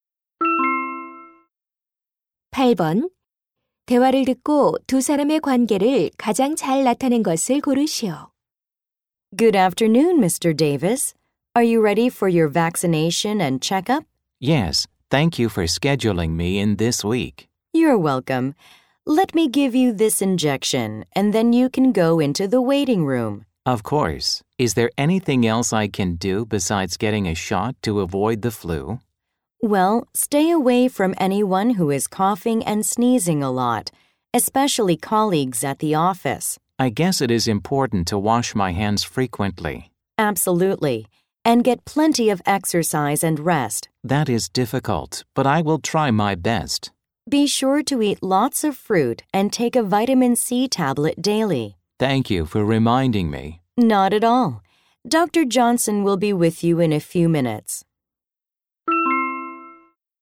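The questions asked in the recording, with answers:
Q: 대화를 듣고 두 사람의 관계를 가장 잘 나타낸 것을 고르시오.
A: 간호사 - 환자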